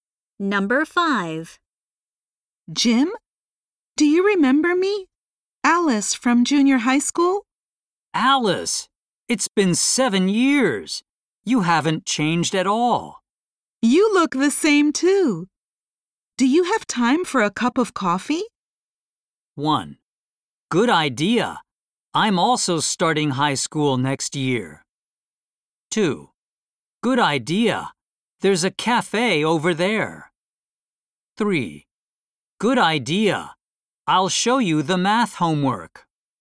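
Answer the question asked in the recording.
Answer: 2: Good idea. There's a cafe over there.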